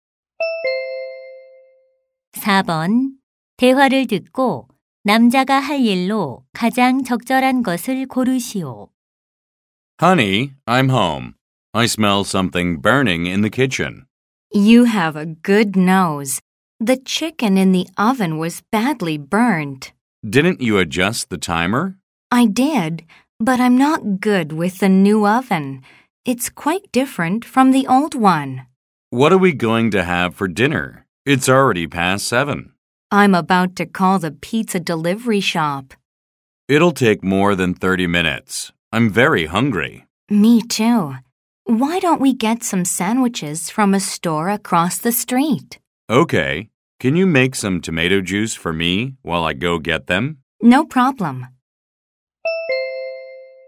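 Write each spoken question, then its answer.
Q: 대화를 듣고 남자가 할 일로 가장 적절한 것을 고르시오.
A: 길 건너 가게에서 샌드위치 사 오기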